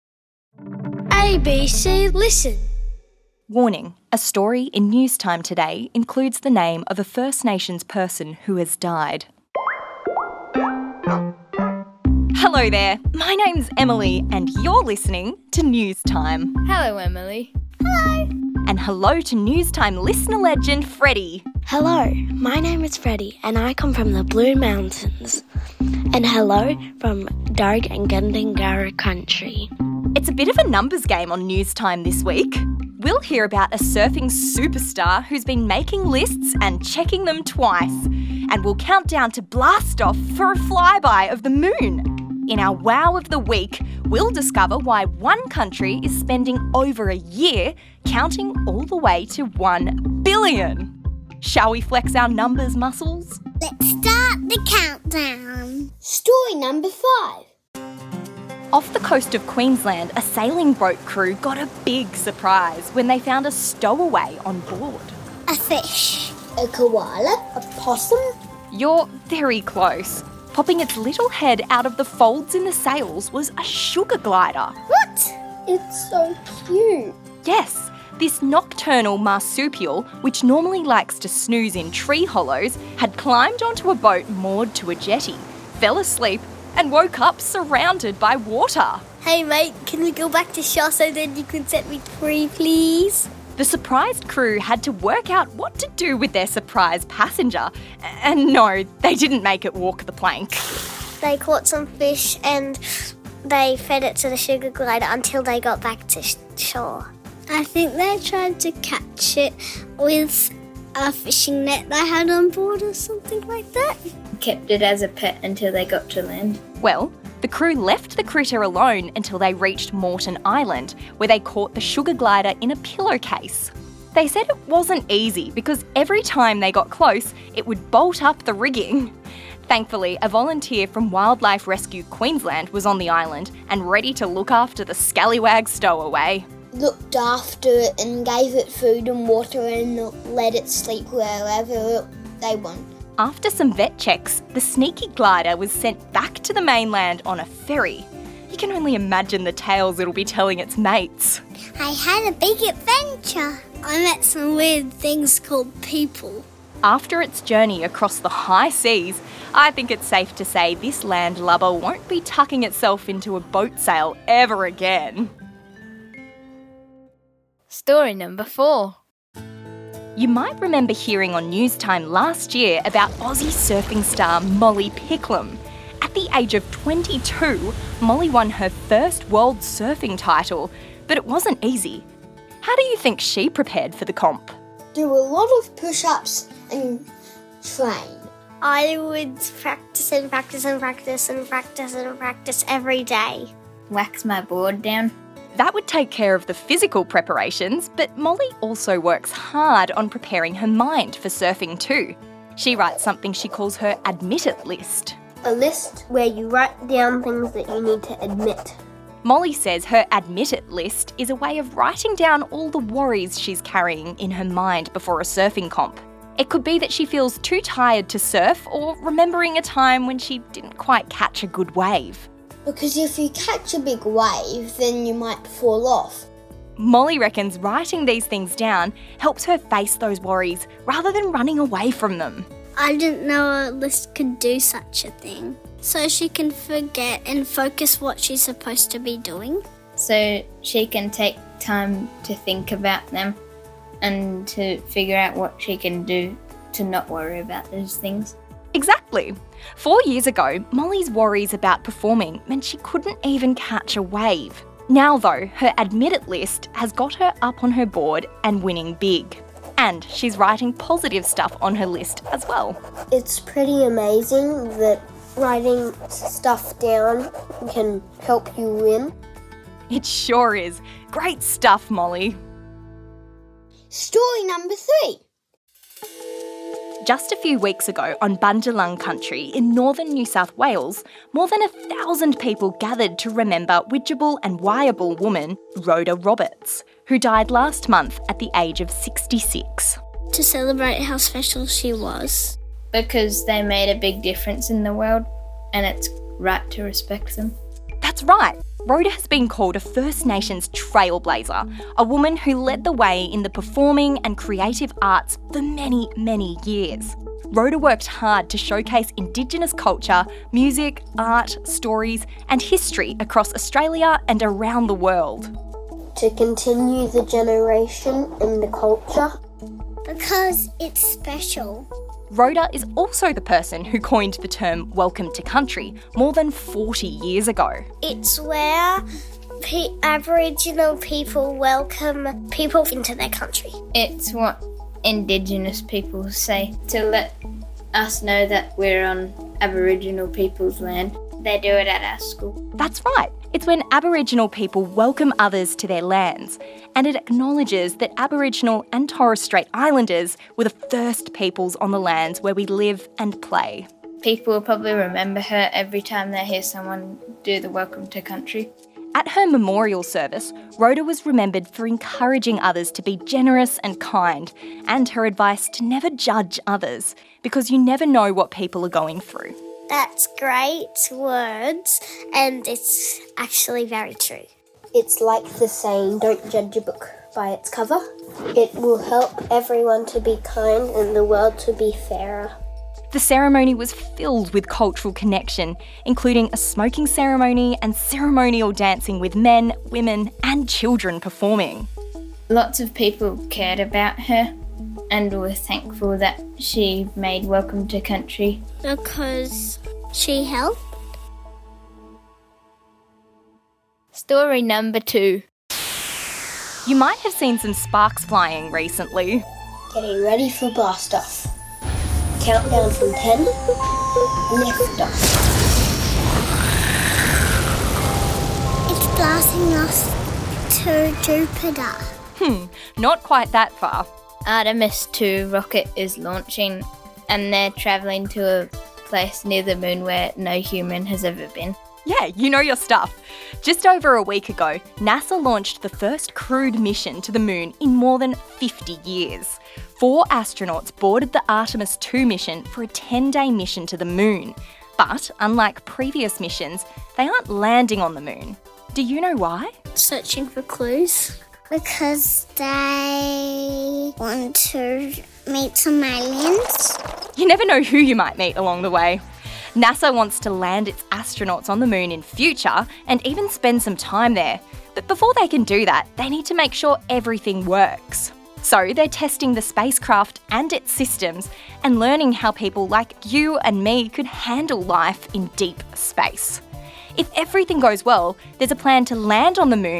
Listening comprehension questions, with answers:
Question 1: Where was the sugar glider having a nap?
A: In the sails of a boat